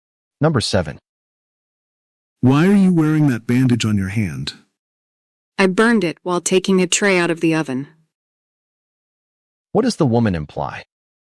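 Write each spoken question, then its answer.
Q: What does the woman imply?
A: She burned her hand on a hot tray.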